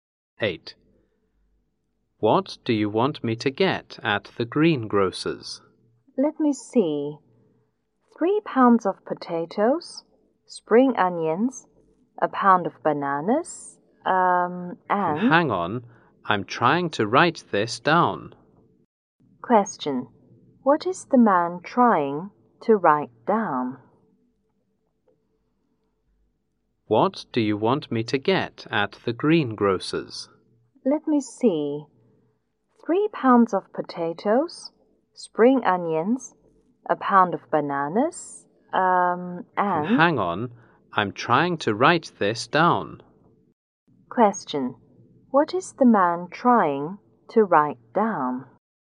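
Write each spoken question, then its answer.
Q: What is the man trying to write down?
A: A shopping list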